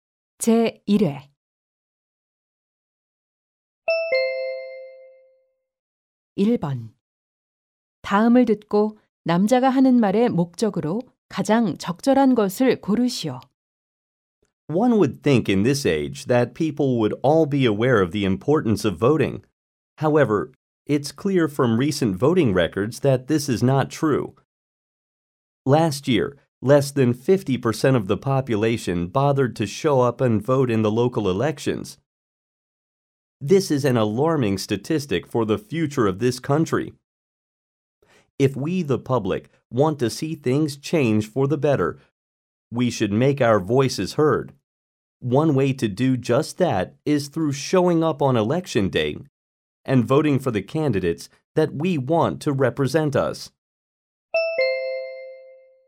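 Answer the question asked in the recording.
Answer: 선거일에 투표할 것을 독려하려고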